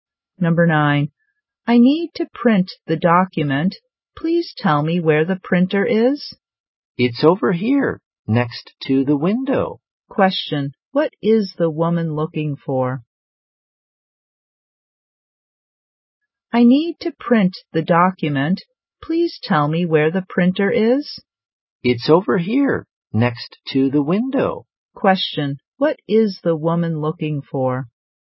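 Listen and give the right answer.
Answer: The printer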